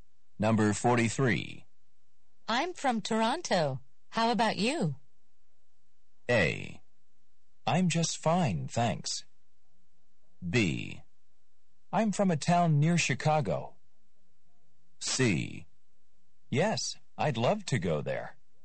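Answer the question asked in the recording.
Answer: B: I'm from a town near Chicago.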